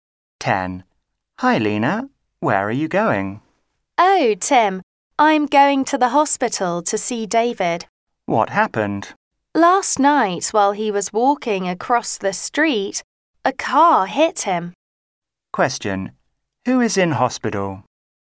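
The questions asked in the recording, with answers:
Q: Who is in hospital?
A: David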